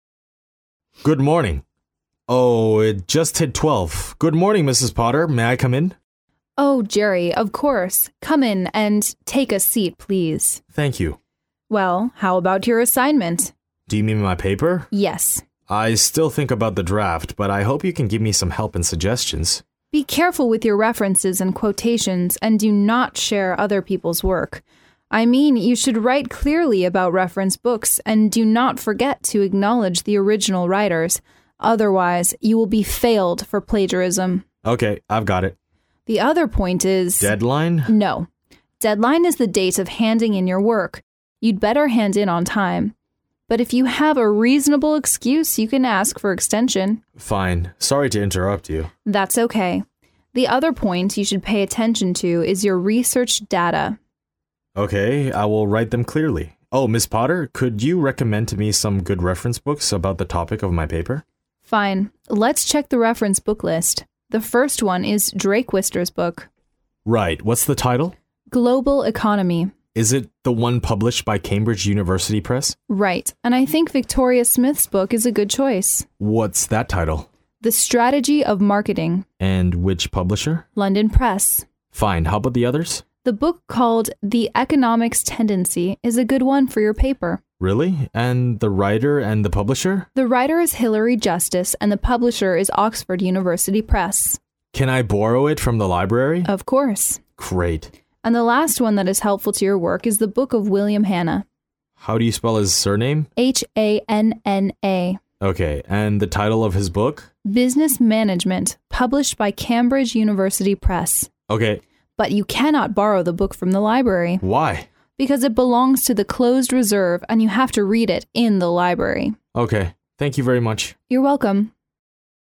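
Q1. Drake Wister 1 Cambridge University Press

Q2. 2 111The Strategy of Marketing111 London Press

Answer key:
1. Global Economy
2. Victoria Smith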